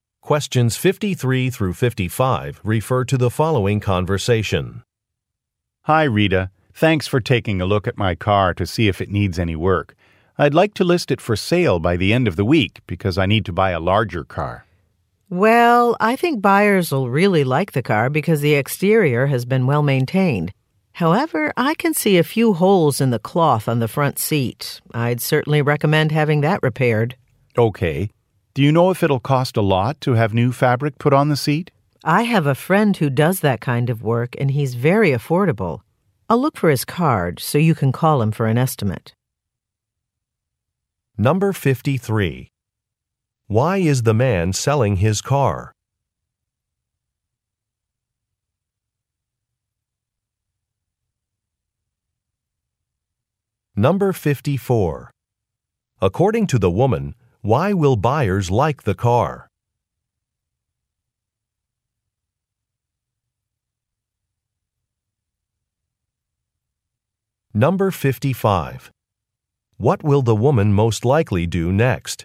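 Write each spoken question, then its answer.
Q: Why is the man selling his car?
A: He needs to buy a larger car.

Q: According to the woman, why will buyers like the car?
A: The exterior has been well maintained.

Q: What will the woman most likely do next?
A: Look for her friend's business card.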